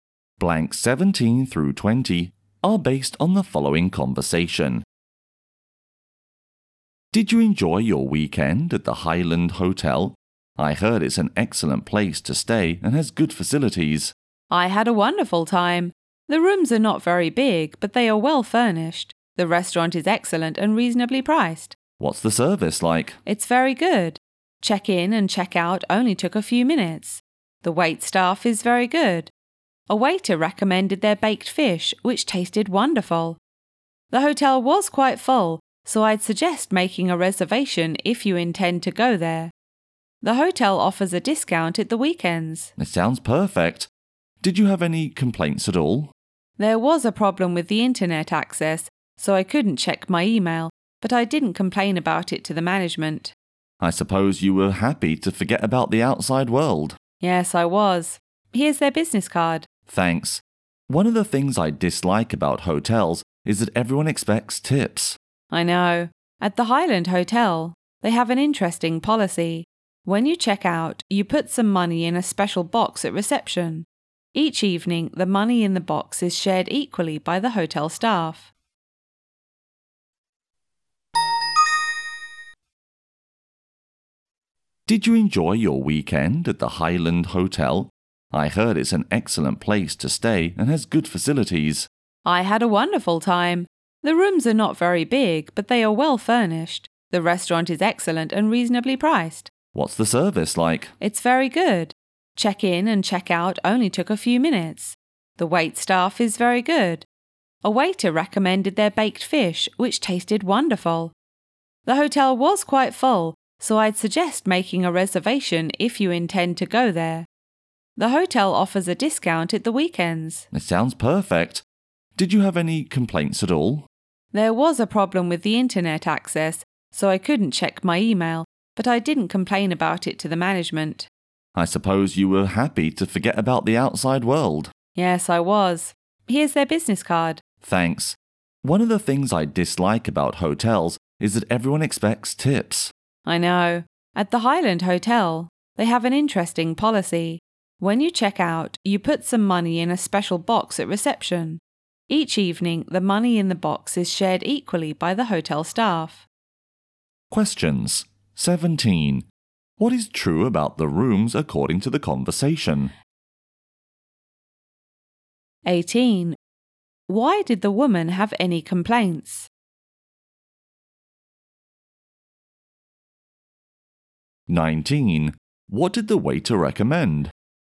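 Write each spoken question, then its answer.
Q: What is true about the rooms according to the conversation?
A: They are not very big but well furnished.

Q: Why did the woman have any complaints?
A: There was a problem with the internet access.

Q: What did the waiter recommend?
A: The baked fish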